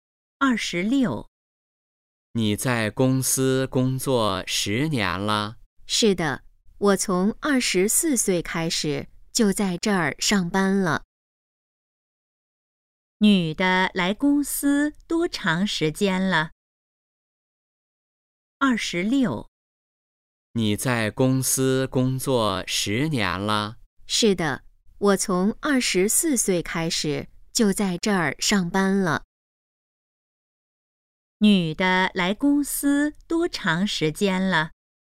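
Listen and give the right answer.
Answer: 十年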